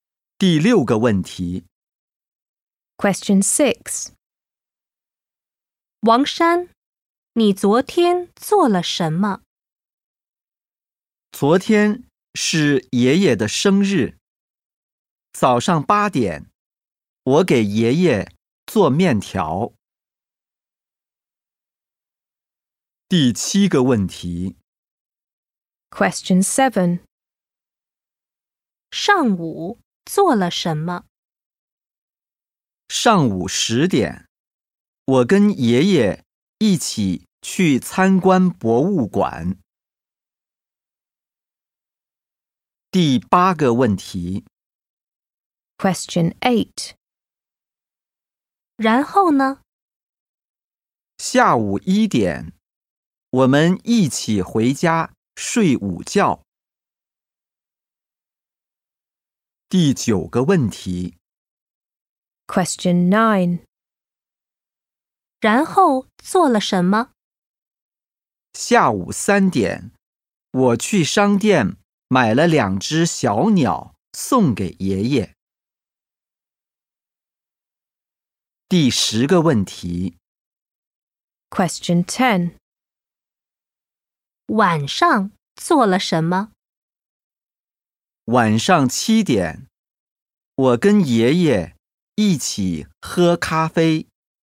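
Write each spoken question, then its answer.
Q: 王山,你昨天做了什么?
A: 早上给爷爷做面条

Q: 上午做了什么?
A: 跟爷爷一起去参观博物馆

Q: 然后做了什么?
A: 去商店买了两只小鸟

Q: 晚上做了什么?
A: 跟爷爷一起喝咖啡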